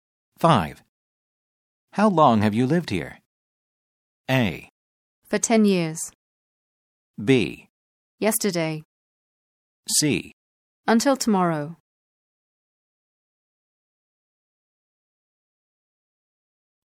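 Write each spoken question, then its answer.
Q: How long have you lived here?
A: A: For 10 years.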